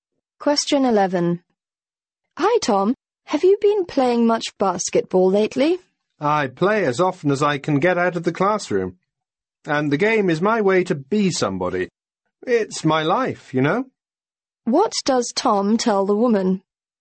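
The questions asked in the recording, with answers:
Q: What does Tom tell the woman?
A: He plays basketball as often as he can; it's his life.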